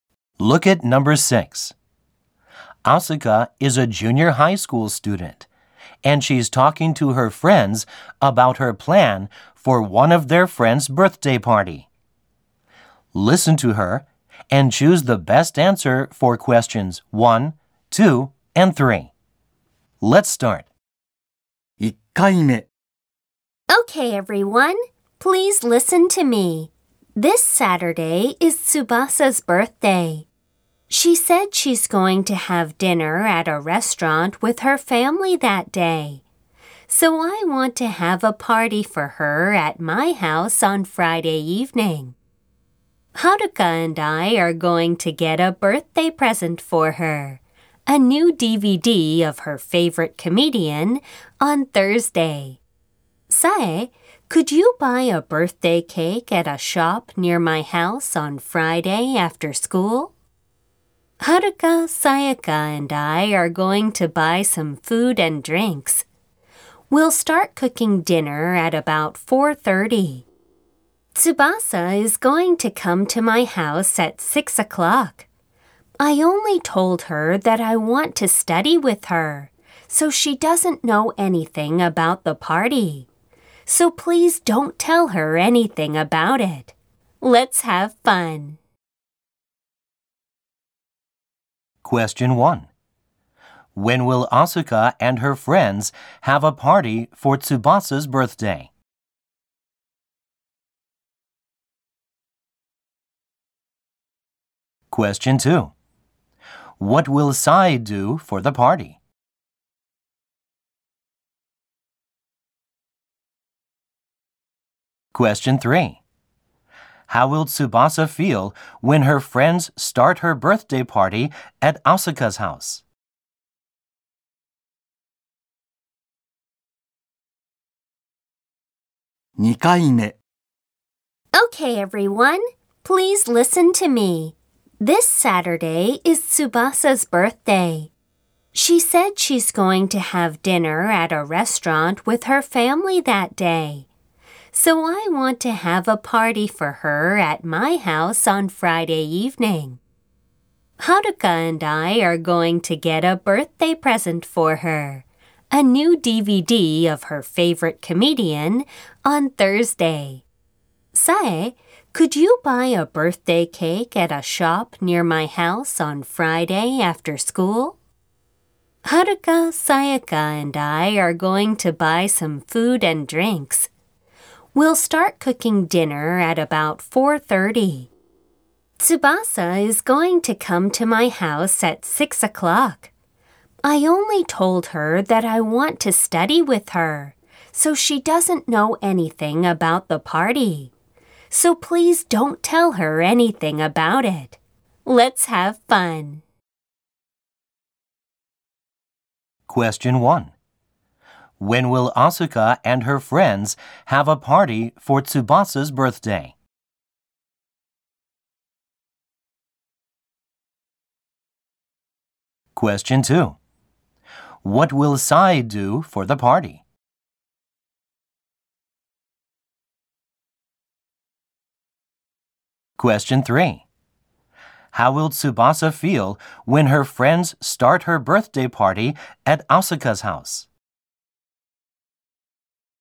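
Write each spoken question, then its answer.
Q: When will Asuka and her friends have a party for Tsubasa's birthday?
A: On Friday evening

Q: What will Sai do for the party?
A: Buy a birthday cake at a shop near Asuka's house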